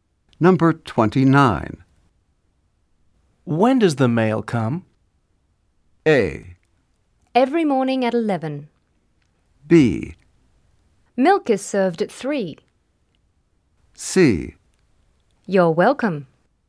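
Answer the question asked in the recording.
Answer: A: Every morning at 11.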